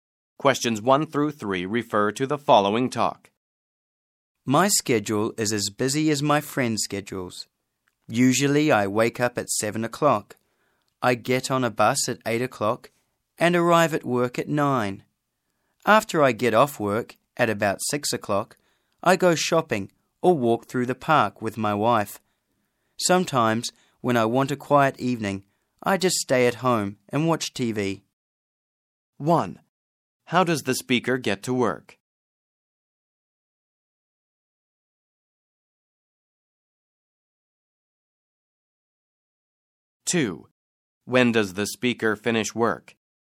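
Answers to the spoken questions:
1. By bus
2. At about 6 o'clock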